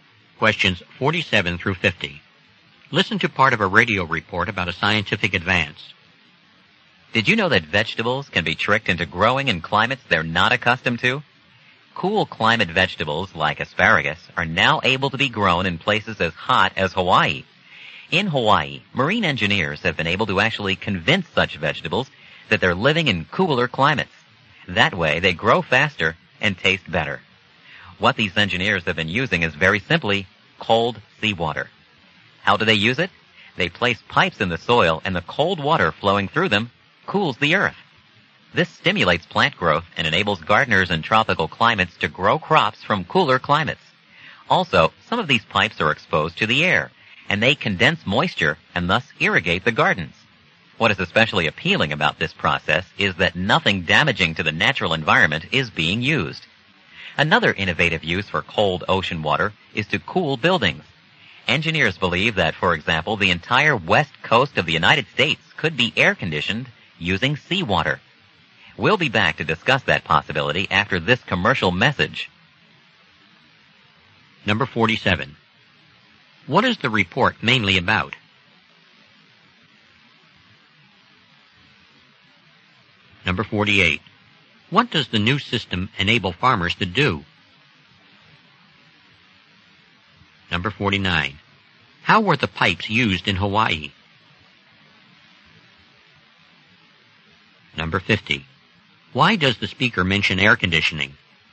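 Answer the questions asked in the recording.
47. Using cold seawater to grow cool-climate vegetables in hot climates
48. Grow cool-climate crops in tropical climates
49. To cool the soil with cold seawater and to irrigate the gardens by condensing moisture
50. It is another possible use of cold seawater, to be discussed next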